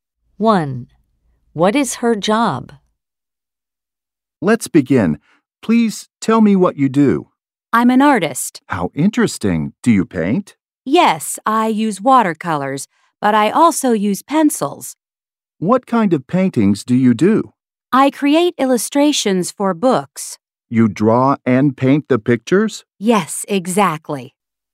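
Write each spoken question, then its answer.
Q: What is her job?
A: An artist who illustrates books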